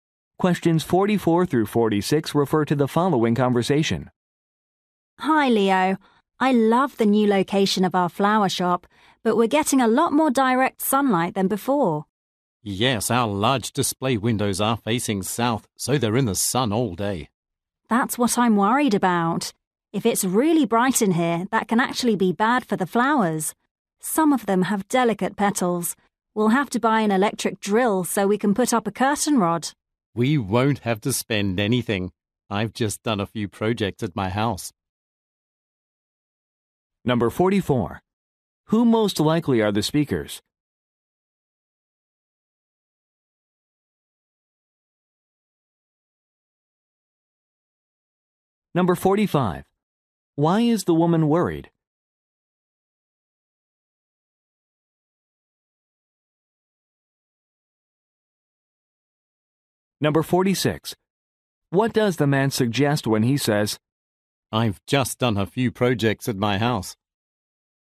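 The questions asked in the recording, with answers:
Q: Who most likely are the speakers?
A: Flower shop workers

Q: Why is the woman worried?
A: Too much sunlight could harm the flowers

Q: What does the man suggest when he says,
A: He already has the tools, so they don't need to buy a drill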